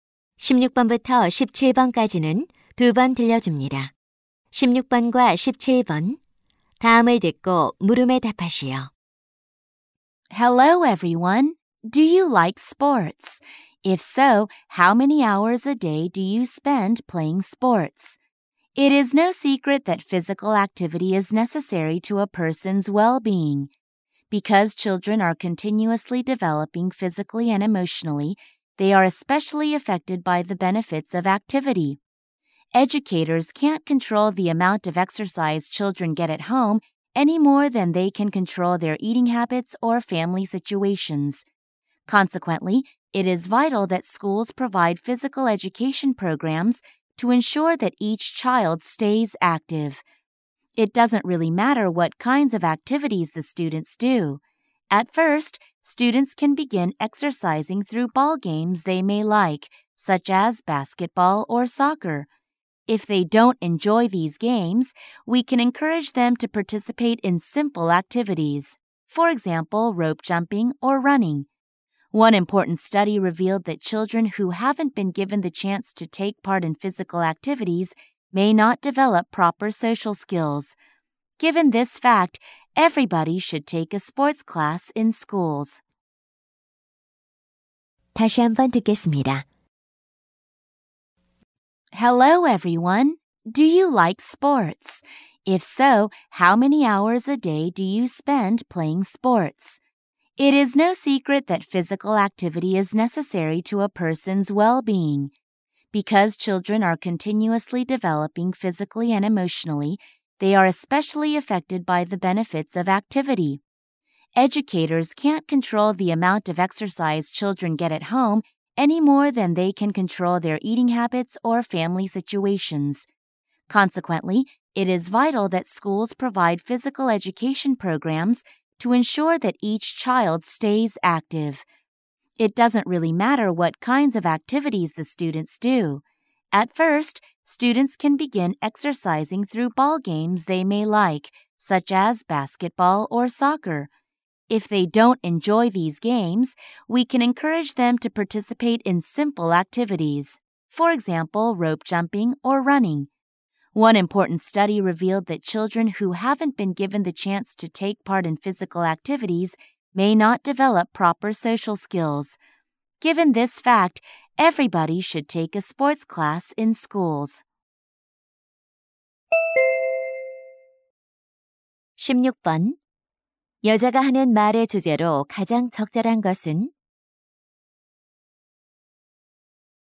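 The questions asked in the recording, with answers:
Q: 여자가 하는 말의 주제로 가장 적절한 것은?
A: 학교 체육 교육의 필요성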